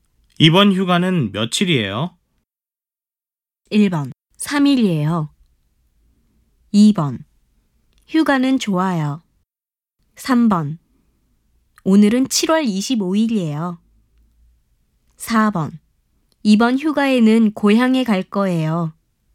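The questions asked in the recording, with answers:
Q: 이번 휴가는 며칠이에요?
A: 1: 3일이에요.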